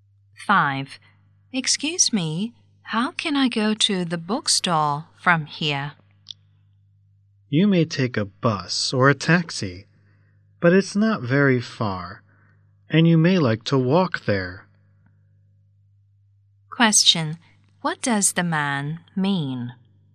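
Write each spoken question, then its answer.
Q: What does the man mean?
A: The bookstore is within walking distance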